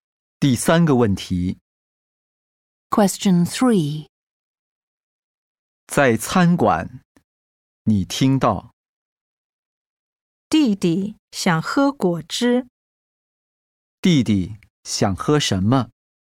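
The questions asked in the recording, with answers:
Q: 弟弟想喝什么?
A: 果汁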